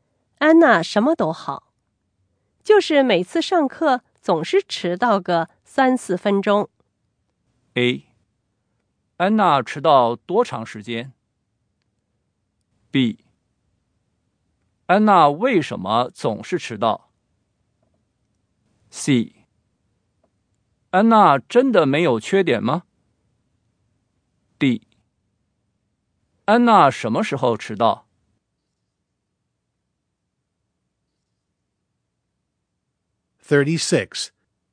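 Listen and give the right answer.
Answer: B: 安娜为什么总是迟到?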